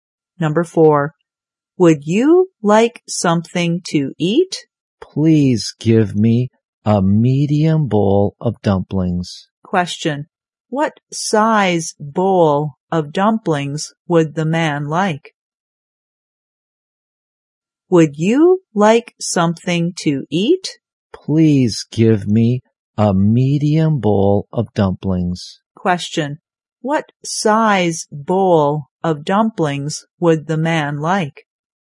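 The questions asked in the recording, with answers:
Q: what size bowl of dumplings would the man like?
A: A medium bowl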